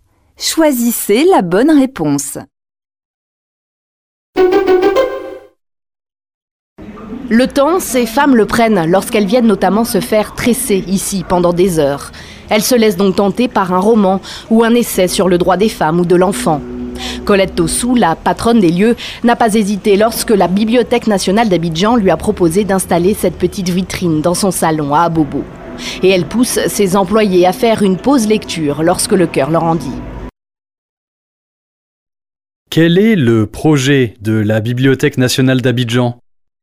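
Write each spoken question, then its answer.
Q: Quel est le projet de la Bibliothèque nationale d'Abidjan ?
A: Installer une petite vitrine de livres dans des salons de coiffure pour faire lire les clientes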